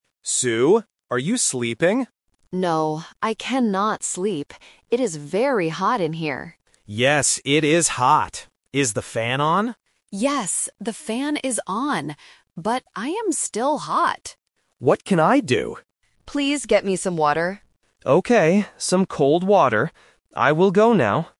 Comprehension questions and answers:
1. Why can't Sue sleep?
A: It is hot.

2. What is on in the room?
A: The fan

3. What does Sue want Tom to get?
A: Some water

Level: A1